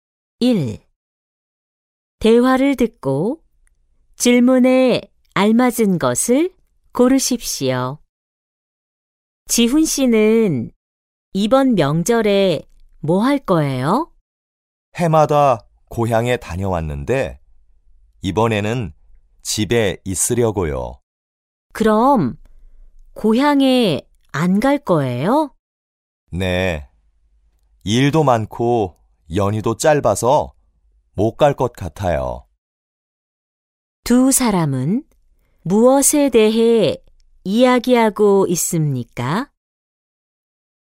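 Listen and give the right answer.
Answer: 명절 계획 (지훈 씨가 이번 명절에 할 일)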